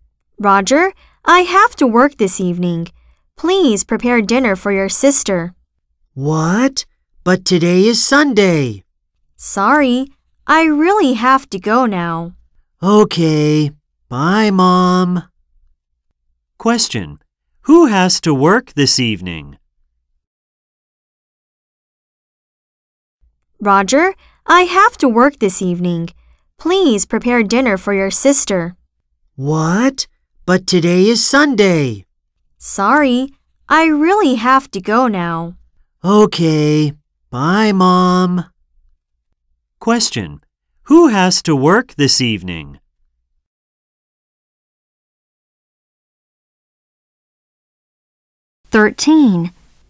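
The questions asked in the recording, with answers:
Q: Who has to work this evening?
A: Roger's mom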